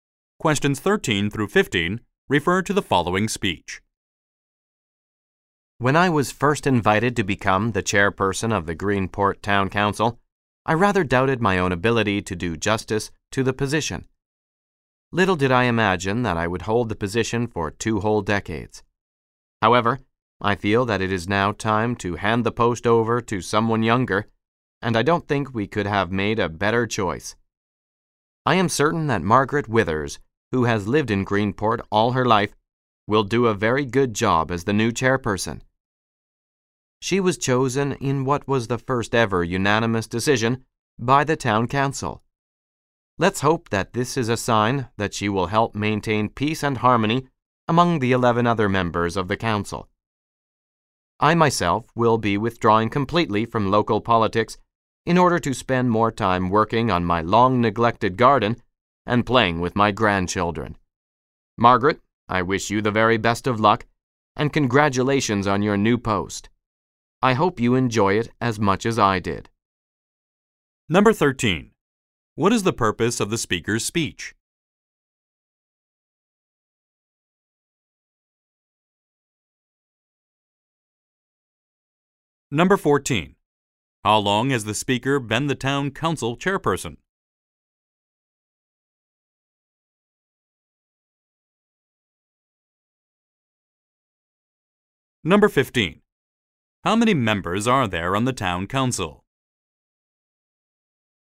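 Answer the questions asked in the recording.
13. To hand the chairperson post over to Margaret Withers and congratulate her.
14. 20 years.
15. 12.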